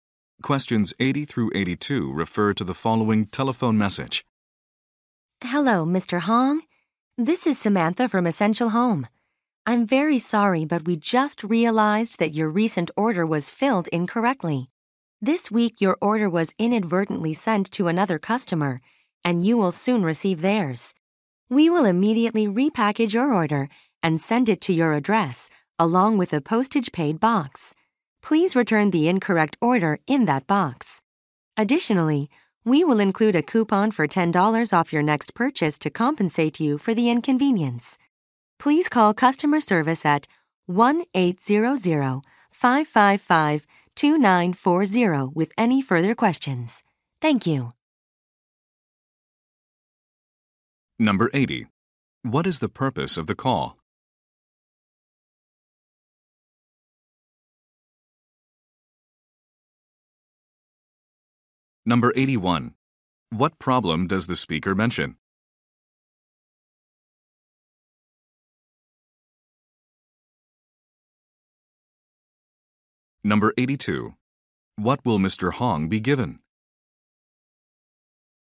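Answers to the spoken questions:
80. To apologize for an incorrectly filled order
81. His order was sent to another customer
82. A $10 coupon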